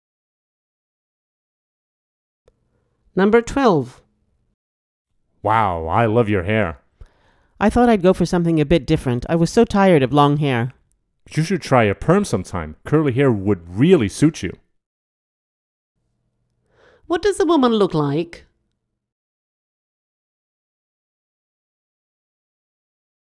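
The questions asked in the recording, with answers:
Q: What does a woman look like?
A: She has short hair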